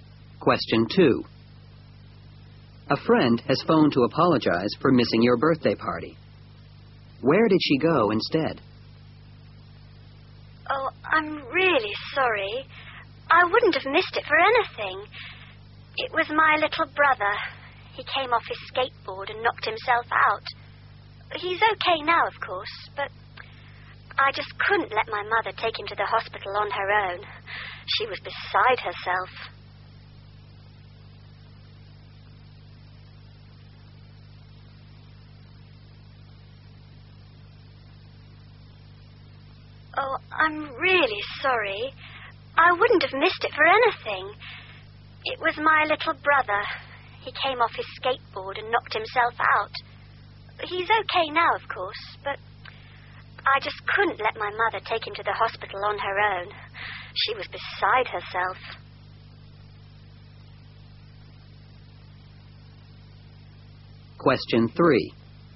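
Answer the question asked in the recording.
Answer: To the hospital with her mother and her little brother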